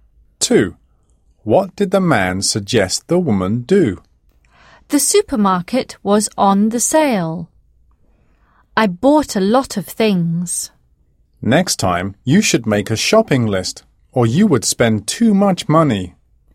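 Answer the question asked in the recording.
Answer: make a shopping list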